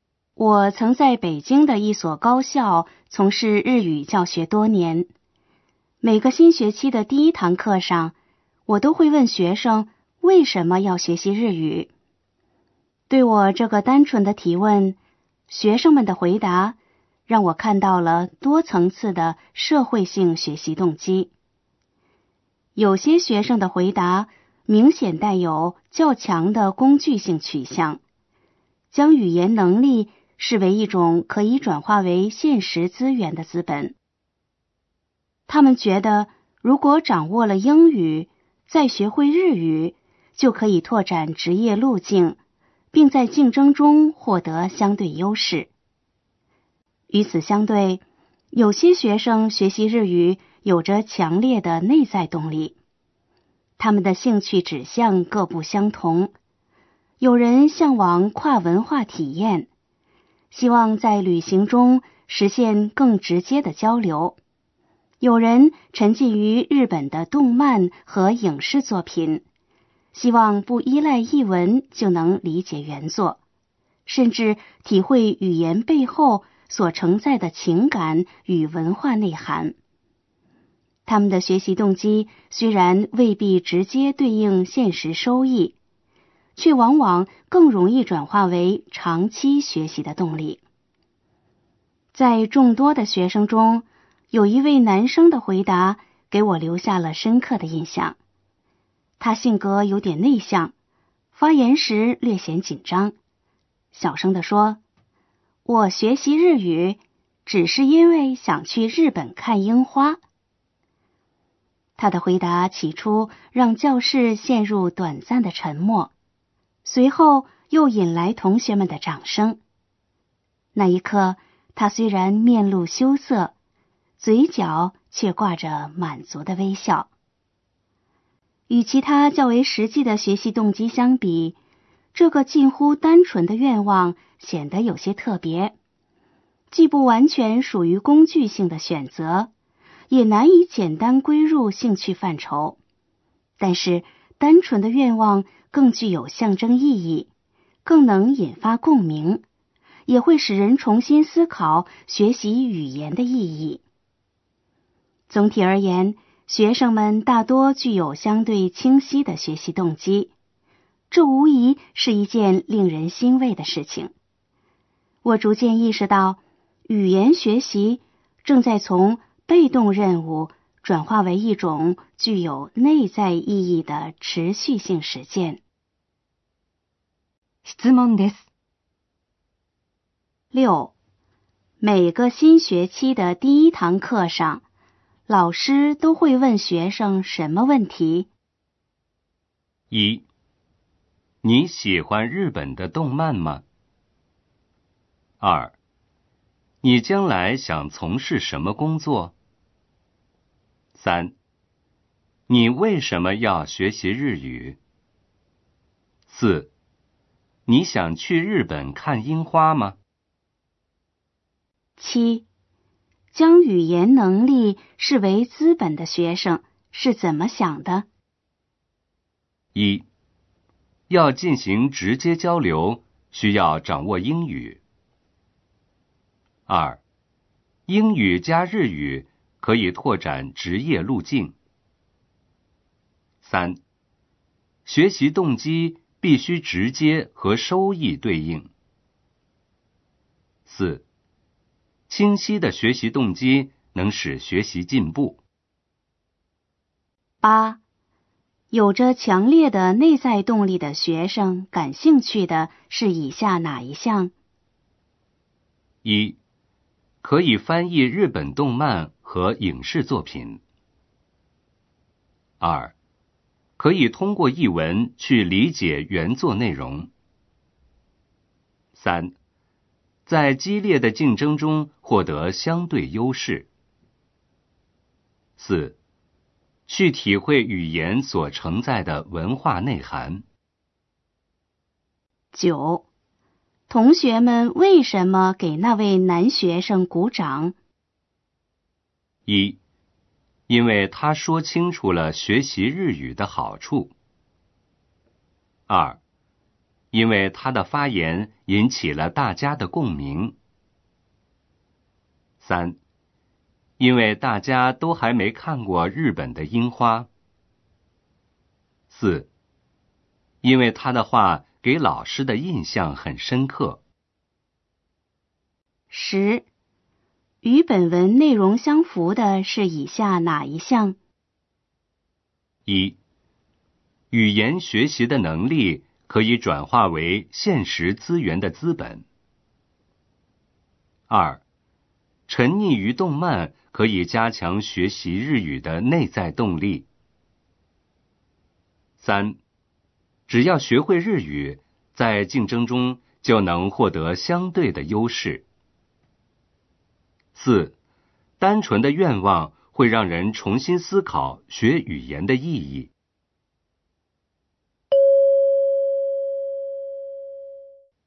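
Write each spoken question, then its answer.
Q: 每个新学期的第一堂课上,老师都会问学生什么问题?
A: 3: 你为什么要学习日语?

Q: 将语言能力视为资本的学生是怎么想的?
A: 2: 英语加日语可以拓展职业路径。

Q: 有着强烈的内在动力的学生感兴趣的是以下哪一项?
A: 4: 去体会语言所承载的文化内涵。

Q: 同学们为什么给那位男学生鼓掌?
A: 2: 因为他的发言引起了大家的共鸣。

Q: 与本文内容相符的是以下哪一项?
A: 4: 单纯的愿望会让人重新思考学语言的意义。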